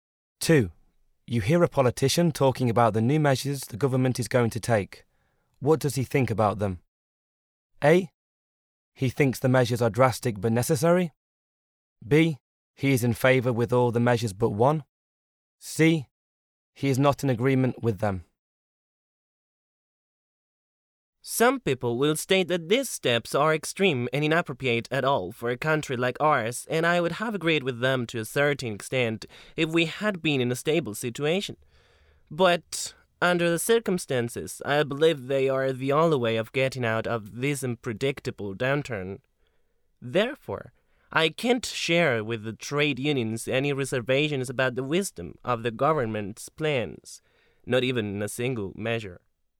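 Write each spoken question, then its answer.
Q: What does he think about them?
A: A: He thinks the measures are drastic but necessary.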